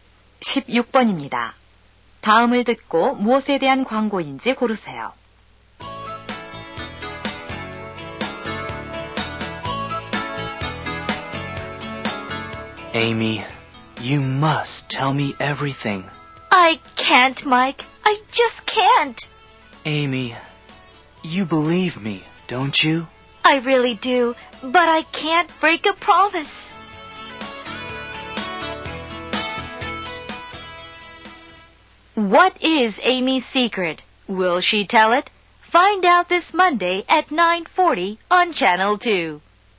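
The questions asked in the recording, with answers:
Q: 다음을 듣고 무엇에 대한 광고인지 고르세요.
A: TV 드라마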